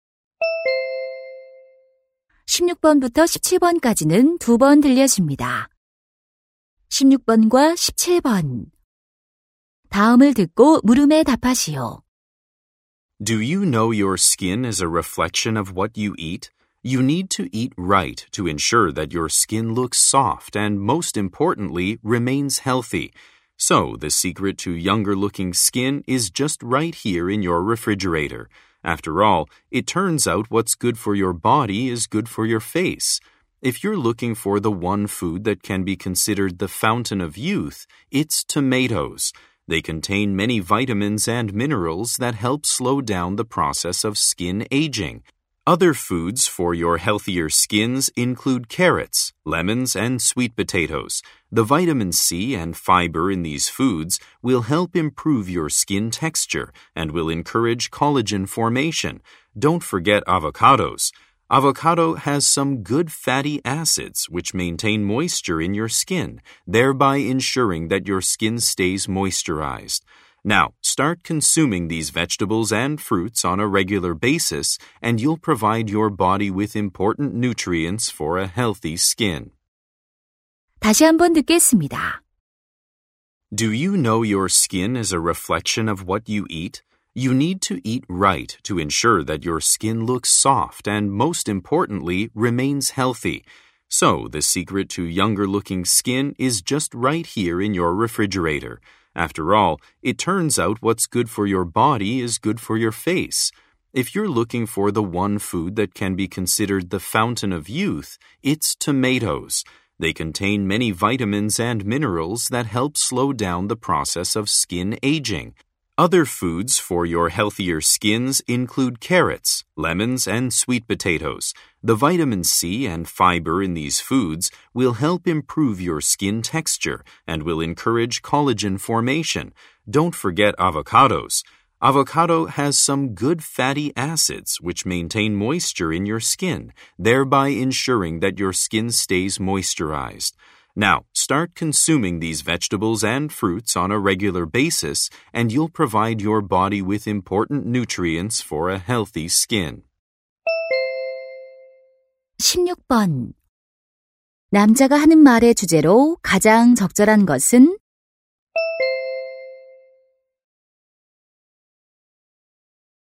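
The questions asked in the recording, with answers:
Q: 남자가 하는 말의 주제로 가장 적절한 것은?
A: 피부 건강에 좋은 음식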